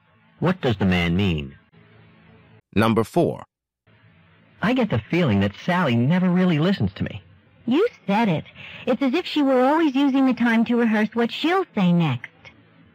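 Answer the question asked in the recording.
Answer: She agrees Sally doesn't really listen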